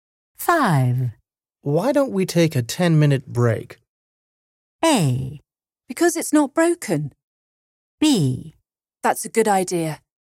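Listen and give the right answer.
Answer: B: That's a good idea.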